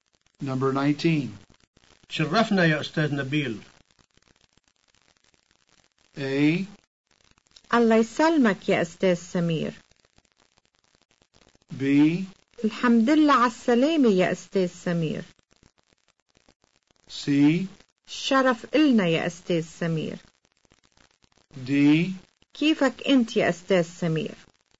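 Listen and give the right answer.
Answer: C: الشرف إلنا يا أستاذ سمير.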